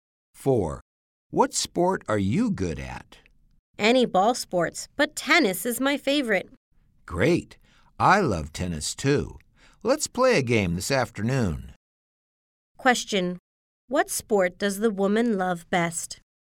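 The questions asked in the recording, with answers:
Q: What sport does the woman love best?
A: Tennis.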